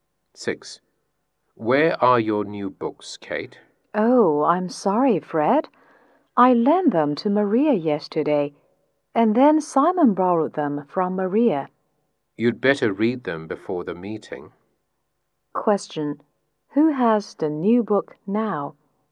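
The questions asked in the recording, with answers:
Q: Who has the new book now?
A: Simon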